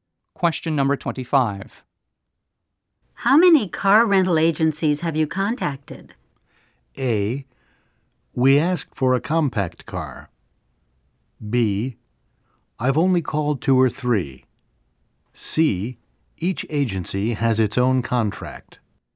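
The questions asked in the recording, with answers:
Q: How many car rental agencies have you contacted?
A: B: I've only called two or three.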